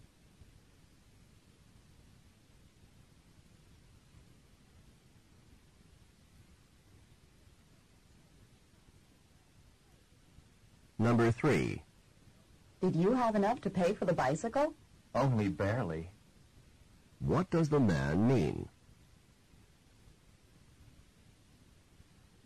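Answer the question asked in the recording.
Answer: He had just enough money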